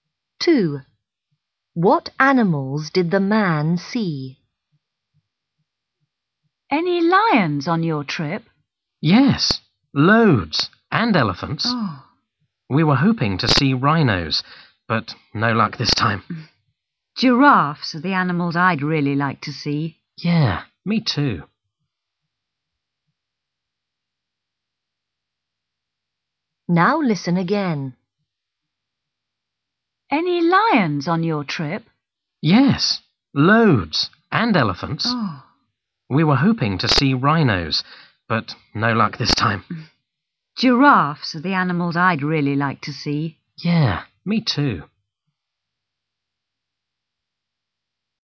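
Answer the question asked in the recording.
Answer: lions and elephants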